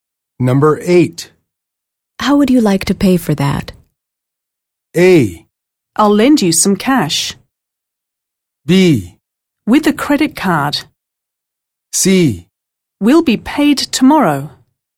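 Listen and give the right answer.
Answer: B: With a credit card.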